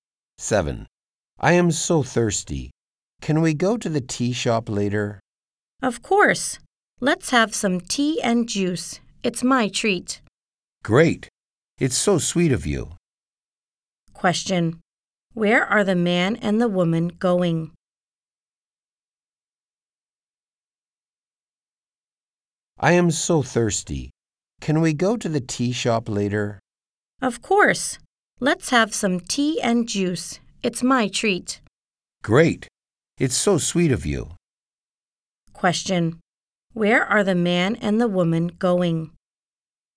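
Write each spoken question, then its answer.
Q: Where are the man and the woman going?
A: To the tea shop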